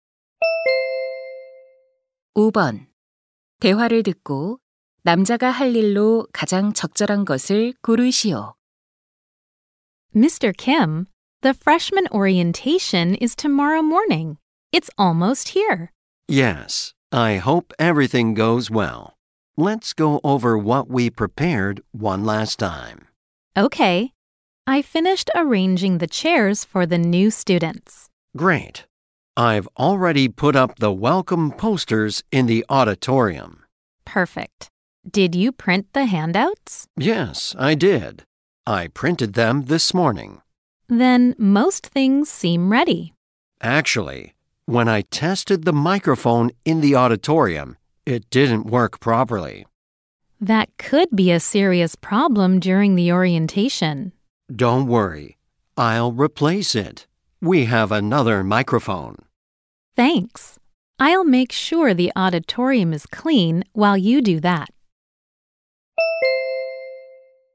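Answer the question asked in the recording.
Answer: 마이크 교체하기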